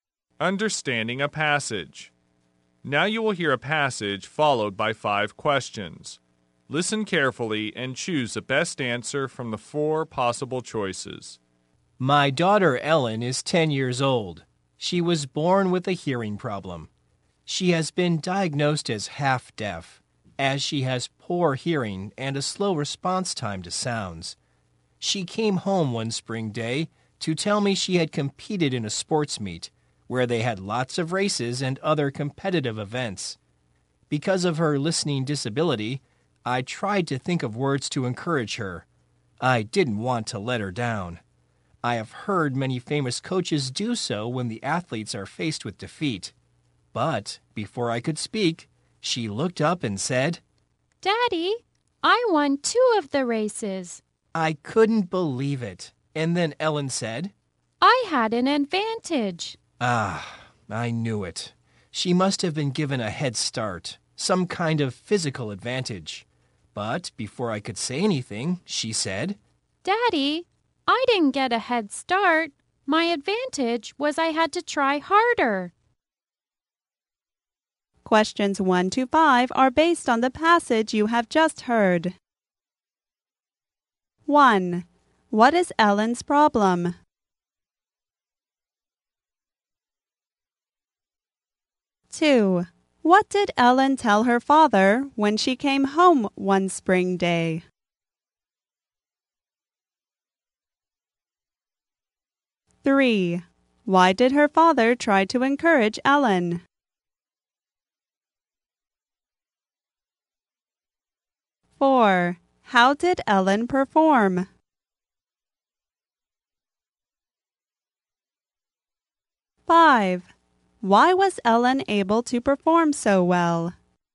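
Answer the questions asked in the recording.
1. She is half deaf / has a hearing problem
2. She had competed in a sports meet
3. Because of her listening disability
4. She won two of the races
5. She had to try harder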